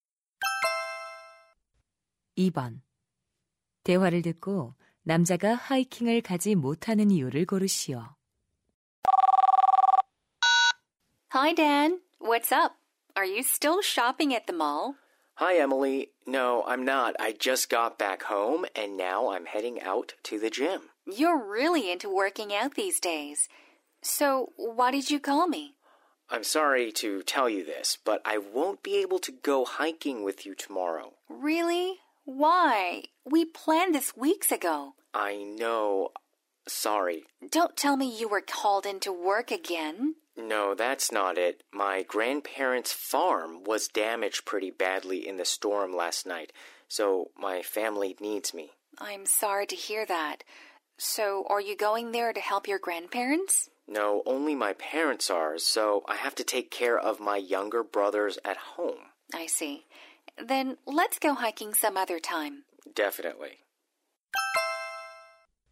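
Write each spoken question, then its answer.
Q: 대화를 듣고 남자가 하이킹을 가지 못하는 이유를 고르시오.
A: 집에서 남동생들을 돌봐야 해서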